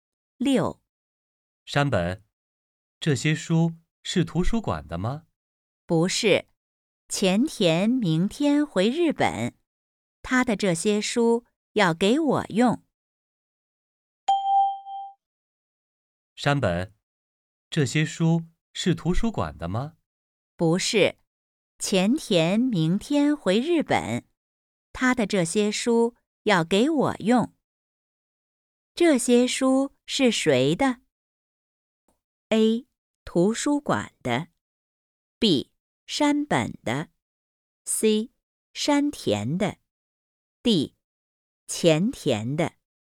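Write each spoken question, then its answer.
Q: 这些书是谁的?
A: D: 前田的。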